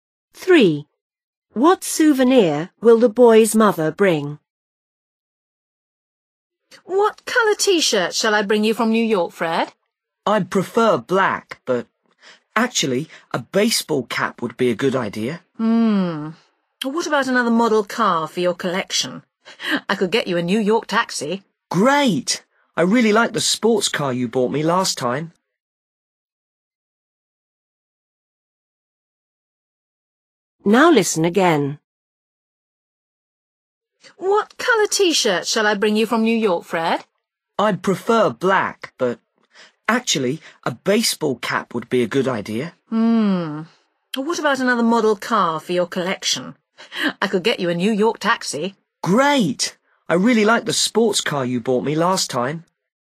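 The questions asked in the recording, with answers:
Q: What souvenir will the boy's mother bring?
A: A model car (a New York taxi)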